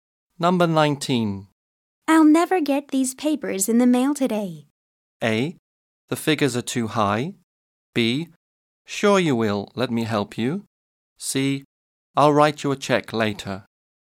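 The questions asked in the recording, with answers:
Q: I'll never get these papers in the mail today.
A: B: Sure you will, let me help you.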